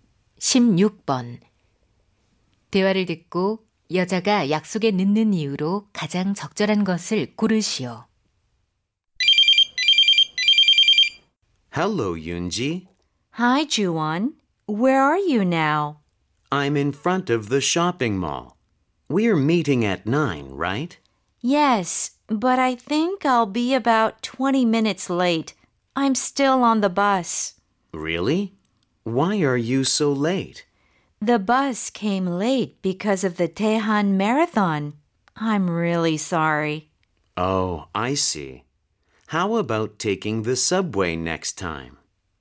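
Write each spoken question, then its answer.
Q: 대화를 듣고 여자가 약속에 늦는 이유로 가장 적절한 것을 고르시오.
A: 마라톤 때문에 버스가 늦게 와서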